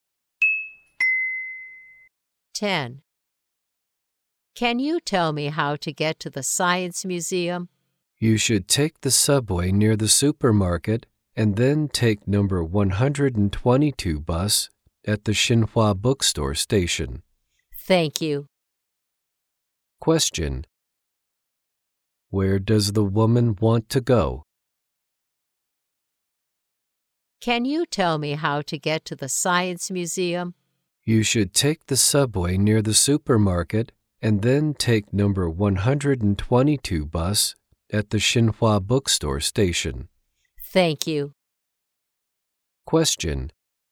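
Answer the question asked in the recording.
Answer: The Science Museum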